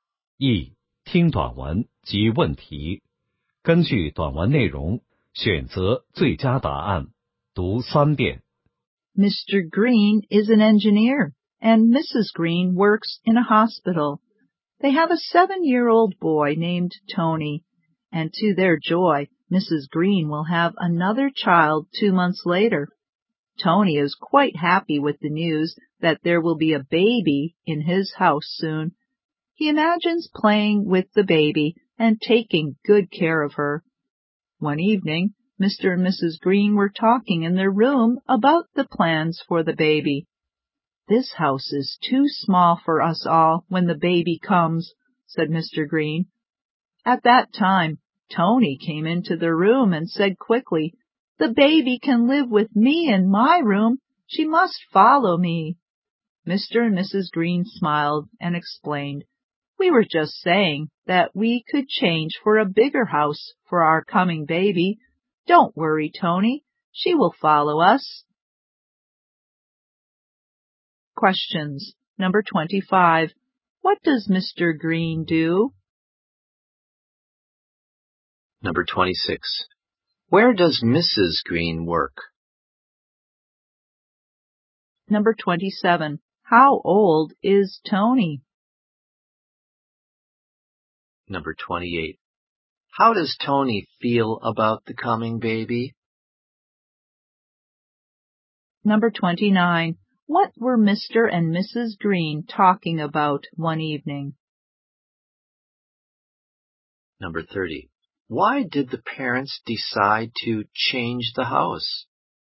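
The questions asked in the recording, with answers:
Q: What does Mr. Green do?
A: He is an engineer

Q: Where does Mrs. Green work?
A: In a hospital

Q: How old is Tony?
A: Seven

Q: How does Tony feel about the coming baby?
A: Happy

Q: What were Mr. and Mrs. Green talking about one evening?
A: Plans for the baby

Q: Why did the parents decide to change the house?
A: The house is too small for them all when the baby comes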